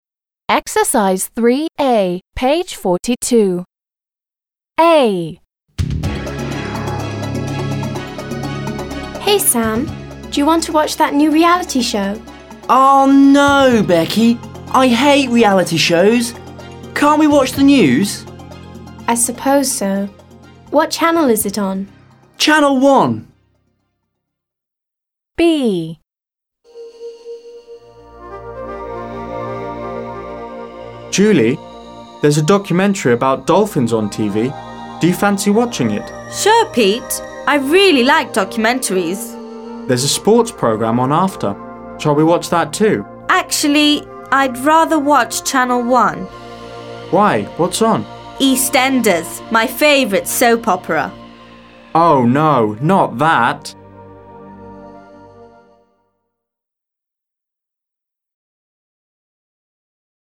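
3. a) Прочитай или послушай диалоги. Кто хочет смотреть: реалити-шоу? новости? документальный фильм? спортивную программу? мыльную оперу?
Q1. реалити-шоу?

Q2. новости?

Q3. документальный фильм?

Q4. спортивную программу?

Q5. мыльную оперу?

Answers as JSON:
{"1": "Becky wants to watch a reality show.", "2": "Sam wants to watch the news.", "3": "Пит и Джули", "4": "Пит", "5": "Джули"}

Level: 7 класс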